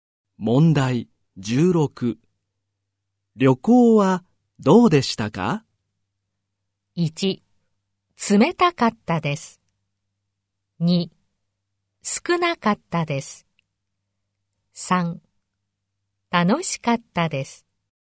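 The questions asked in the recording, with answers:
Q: 旅行はどうでしたか?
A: 3: 楽しかったです。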